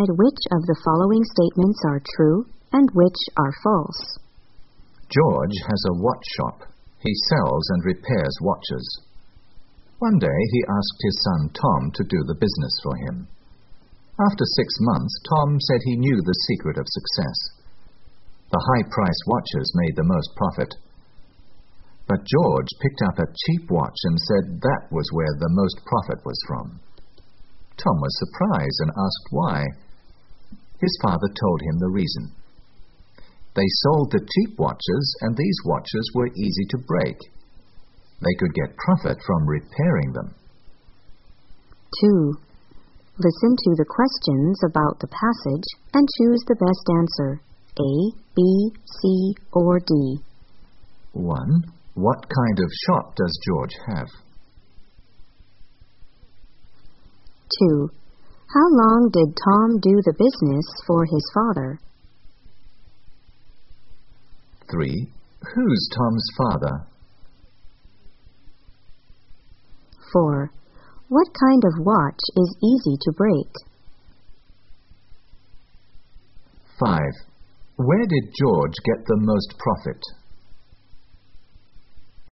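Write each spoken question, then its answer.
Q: What kind of shop does George have?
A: A watch shop

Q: How long did Tom do the business for his father?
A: 6 months

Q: Who's Tom's father?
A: George

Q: What kind of watch is easy to break?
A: Cheap watches

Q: Where did George get the most profit?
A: From repairing the cheap watches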